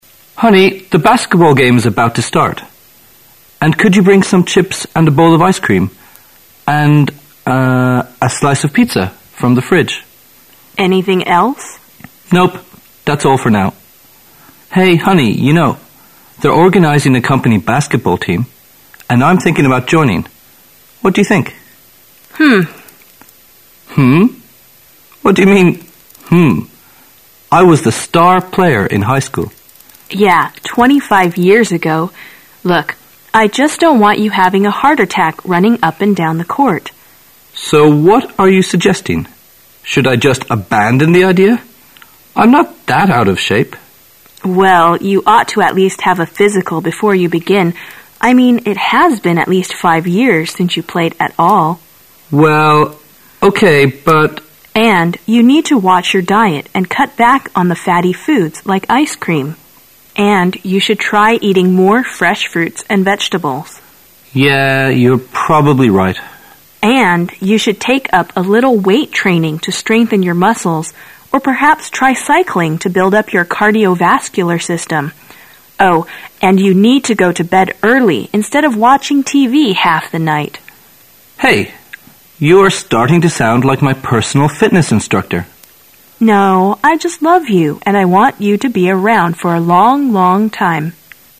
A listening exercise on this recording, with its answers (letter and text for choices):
Questions 1 to 3 are based on the following conversation. At the end of the conversation, you will be given 15 seconds to answer the questions. Now listen to the conversation.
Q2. What does the woman suggest the man do?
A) He should become a member in the new organization.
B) He should have some chips and a bowl of ice cream.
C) He should stay at home and watch TV at night.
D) He should watch his diet and do proper exercises.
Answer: D) He should watch his diet and do proper exercises.

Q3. Which of the following is NOT true about the man?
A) He used to be the star player in high school.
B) He has put on much weight now.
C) He likes fresh fruits and vegetables.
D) He stopped playing basketball five years ago.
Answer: C) He likes fresh fruits and vegetables.

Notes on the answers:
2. 本题测试在理解文中主要相关信息基础上的总结和归纳能力。该题问对话中的女子建议该男子做什么,从文中提供的相关信息可知,她建议他应该注意饮食、适度运动,因此正确答案为D。 注意以下几个关键词组在本文中的含义: have a physical进行体格检查 watch(your diet)小心、注意(饮食)(尤指应加以控制) cut back on sth.=cut sth. back大量削减某物 take up开始从事
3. 本题测试对全文的重要内容的理解能力。该题要求判断四条选项对对话中男子的描述中哪条是错误的。从文中的相关信息可知,选项A和D在文中都有明确提及。从女子建议他"cut back on the fatty foods"(少吃让人发胖的食物),可推测男子现在体重增加很多;从女子建议男子应该"try eating more fresh fruits and vegetables",可以推测他不喜欢吃新鲜水果和蔬菜,因此答案应为C。 cardiovascular system心血管系统 be around在某一领域或行业中活跃而突出 如:He's been around as a film director since the 10970's.(从20世纪70年代起,他就是个很活跃的电影导演。)

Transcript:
[解析] 1-3 M: Honey, the basketball game is about to start. And could you bring some chips and a bowl of ice cream? And ... a slice of pizza from the fridge. W: Anything else? M: Nope, that's all for now. Hey, honey, you know, they're organizing a company basketball team, and I'm thinking about joining. What do you think? What do you mean "Humph"? I was the star player in high school. W: Yeah, twenty-five years ago. Look, I just don't want you having a heart attack running up and down the court. M: So, what are you suggesting? Should I just abandon the idea? I'm not that out of shape. W: Well, you ought to at least have a physical before you begin. I mean, it has been at least five years since you played at all. M: Well, okay, but... W: And you need to watch your diet and cut back on the fatty foods, like ice cream. And you should try eating more fresh fruits and vegetables. M: Yeah, you're probably right. W: And you should take up a little weight training to strengthen your muscles or perhaps try cycling to build up your cardiovascular system. Oh, and you need to go to bed early instead of watching TV half the night. M: Hey, you're starting to sound like my personal fitness instructor! W: No, I just love you, and I want you to be around for a long, long time.